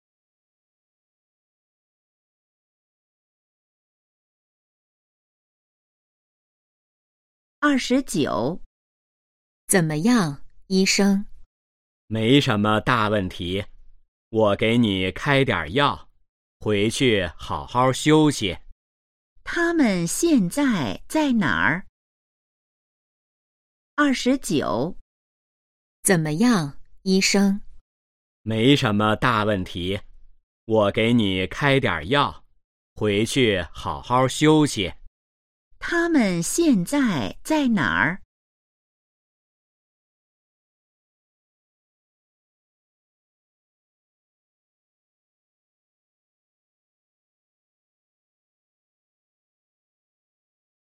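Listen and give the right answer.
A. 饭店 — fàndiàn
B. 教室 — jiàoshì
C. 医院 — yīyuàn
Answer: C. 医院 — yīyuàn

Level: HSK2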